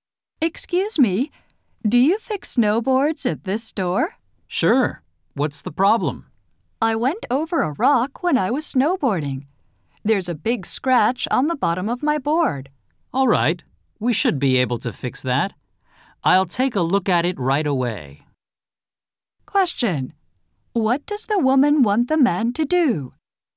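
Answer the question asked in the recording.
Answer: Fix the scratch on her snowboard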